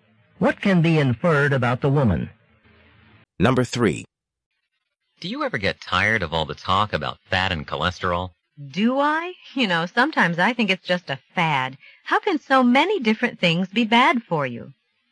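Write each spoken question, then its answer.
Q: What does the woman imply?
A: She thinks the concern about fat and cholesterol is exaggerated, just a fad.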